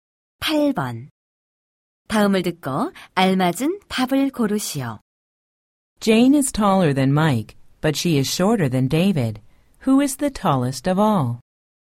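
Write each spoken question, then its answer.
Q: Who is the tallest of all?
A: David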